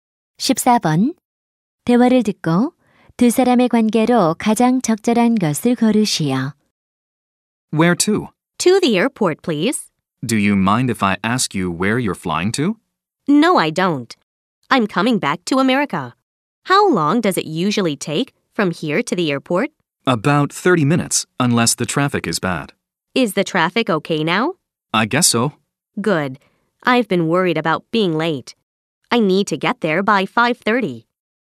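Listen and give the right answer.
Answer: 택시 기사와 승객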